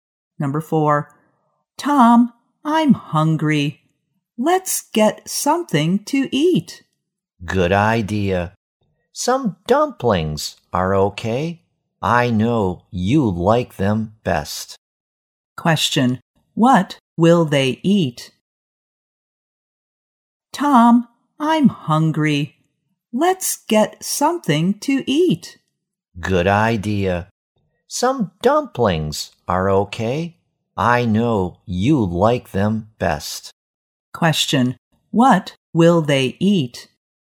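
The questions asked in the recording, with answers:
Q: What will they eat?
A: Dumplings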